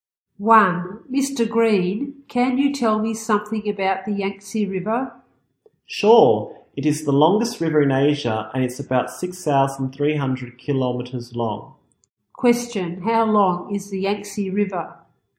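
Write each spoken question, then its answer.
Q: How long is the Yangtze River?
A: About 6,300 kilometers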